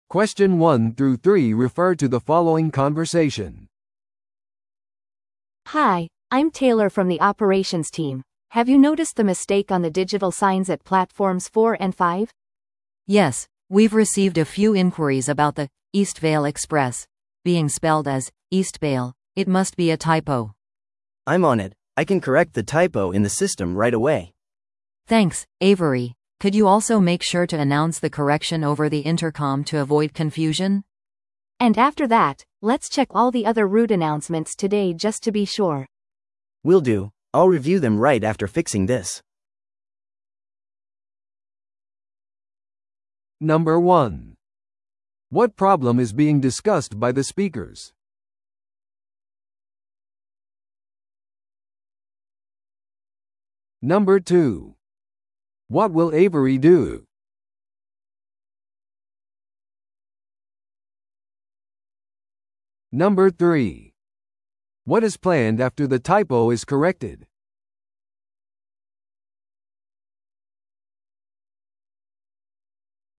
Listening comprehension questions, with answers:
Listen to the audio below and answer the questions.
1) What problem is being discussed by the speakers?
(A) バスのスケジュールの遅延。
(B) デジタル表示のタイプミス。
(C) アナウンスの発音間違い。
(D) 壊れたデジタル表示。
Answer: (B) デジタル表示のタイプミス。

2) What will Avery do?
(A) オペレーションシステム全体をチェックする。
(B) 直にお客様に謝罪する。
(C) インターコムでアナウンスを行う。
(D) デジタルサインを交換する。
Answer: (C) インターコムでアナウンスを行う。

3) What is planned after the typo is corrected?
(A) スタッフミーティングが開かれる。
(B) 全ての路線発表が見直される。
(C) バスターミナルのオペレーションチームが再トレーニングされる。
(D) 新しいデジタル表示システムが設置される。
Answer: (B) 全ての路線発表が見直される。

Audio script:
A: Hi, I'm Taylor from the operations team. Have you noticed the mistake on the digital signs at platforms 4 and 5?
B: Yes, we've received a few inquiries about the 'Eastvale Express' being spelled as 'Eastbale'. It must be a typo.
C: I'm on it. I can correct the typo in the system right away.
B: Thanks, Avery. Could you also make sure to announce the correction over the intercom to avoid confusion?
A: And after that, let's check all the other route announcements today just to be sure.
C: Will do. I'll review them right after fixing this.

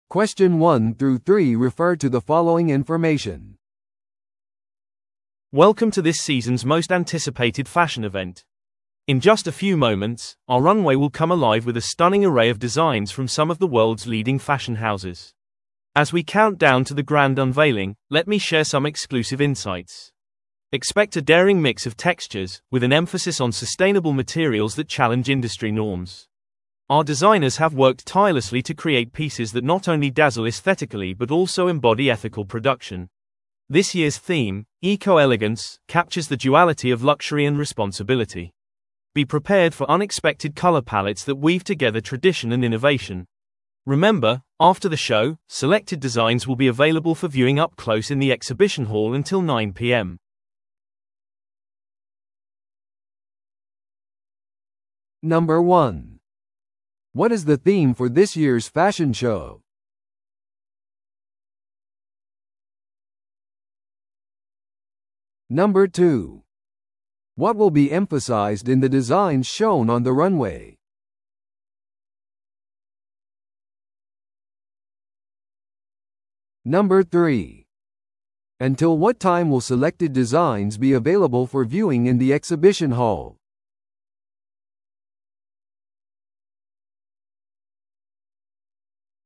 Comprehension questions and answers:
Listen to the audio below and answer the questions.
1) What is the theme for this year's fashion show?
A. カラフルトラディション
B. テクスチャードトレンド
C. エコエレガンス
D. 革新的な贅沢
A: C. エコエレガンス

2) What will be emphasized in the designs shown on the runway?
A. ハイテク要素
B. 持続可能な素材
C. 歴史的影響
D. 正式なイブニングウェア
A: B. 持続可能な素材

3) Until what time will selected designs be available for viewing in the exhibition hall?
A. 7pmまで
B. 8pmまで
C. 9pmまで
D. イベント終了まで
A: C. 9pmまで

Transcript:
Welcome to this season's most anticipated fashion event. In just a few moments, our runway will come alive with a stunning array of designs from some of the world's leading fashion houses. As we count down to the grand unveiling, let me share some exclusive insights. Expect a daring mix of textures, with an emphasis on sustainable materials that challenge industry norms. Our designers have worked tirelessly to create pieces that not only dazzle aesthetically but also embody ethical production. This year's theme, 'EcoElegance', captures the duality of luxury and responsibility. Be prepared for unexpected color palettes that weave together tradition and innovation. Remember, after the show, selected designs will be available for viewing up close in the exhibition hall until 9pm.

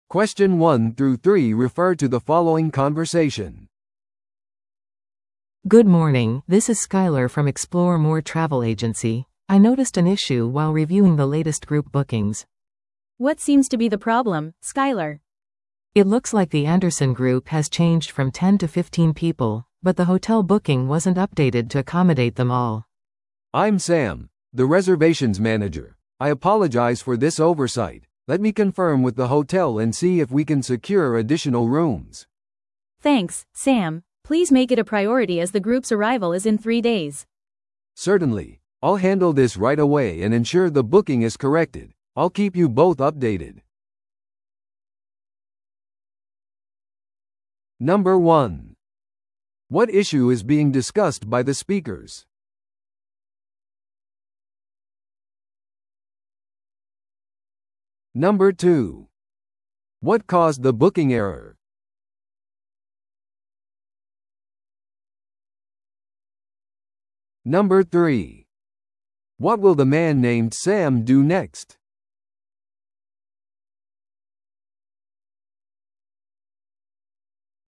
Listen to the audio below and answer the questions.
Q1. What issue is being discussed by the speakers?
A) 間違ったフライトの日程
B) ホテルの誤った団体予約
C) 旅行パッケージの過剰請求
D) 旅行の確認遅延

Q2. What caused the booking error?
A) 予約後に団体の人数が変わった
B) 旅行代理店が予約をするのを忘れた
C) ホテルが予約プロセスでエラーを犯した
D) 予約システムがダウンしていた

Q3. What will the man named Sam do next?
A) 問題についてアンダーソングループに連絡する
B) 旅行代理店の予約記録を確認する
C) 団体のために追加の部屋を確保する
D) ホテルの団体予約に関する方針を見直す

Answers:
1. B) ホテルの誤った団体予約
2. A) 予約後に団体の人数が変わった
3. C) 団体のために追加の部屋を確保する

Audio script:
A: Good morning, this is Skyler from Explore More Travel Agency. I noticed an issue while reviewing the latest group bookings.
B: What seems to be the problem, Skyler?
A: It looks like the Anderson group has changed from ten to fifteen people, but the hotel booking wasn't updated to accommodate them all.
C: I'm Sam, the reservations manager. I apologize for this oversight. Let me confirm with the hotel and see if we can secure additional rooms.
B: Thanks, Sam. Please make it a priority as the group's arrival is in three days.
C: Certainly. I'll handle this right away and ensure the booking is corrected. I'll keep you both updated.

